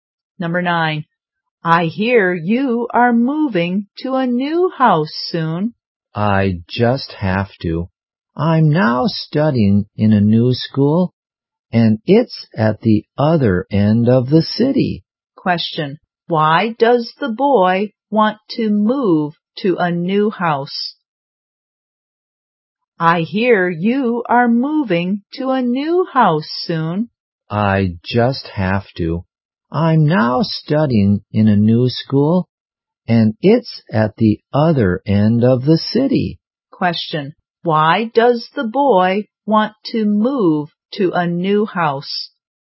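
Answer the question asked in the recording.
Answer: His new school is at the other end of the city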